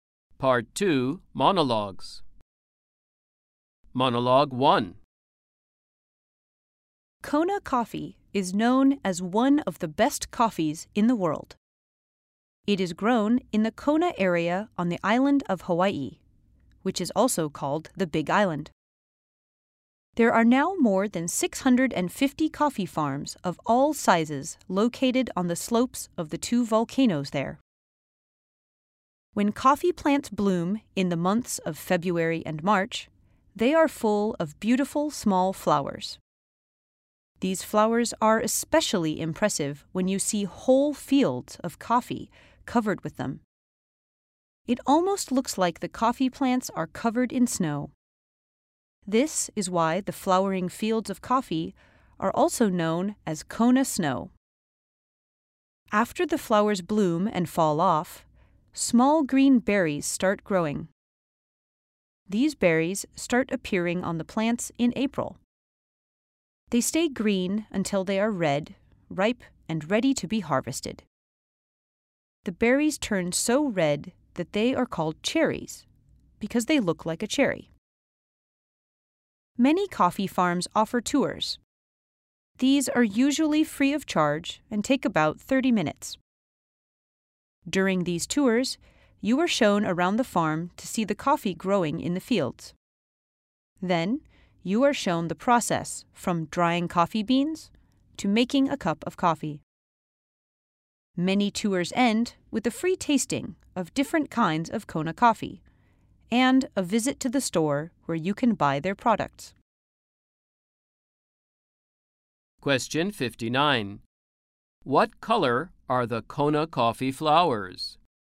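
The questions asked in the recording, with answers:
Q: What color are the Kona coffee flowers?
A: White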